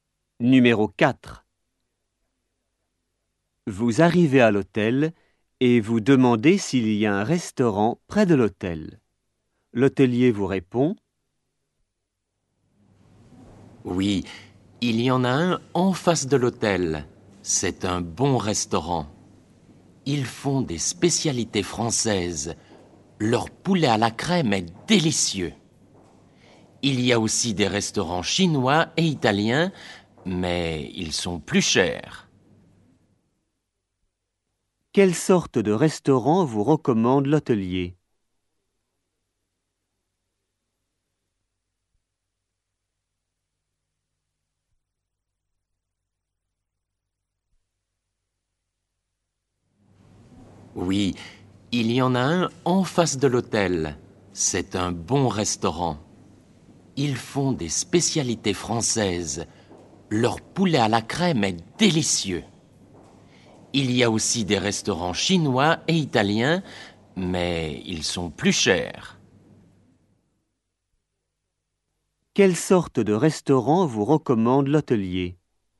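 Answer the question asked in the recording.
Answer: un restaurant français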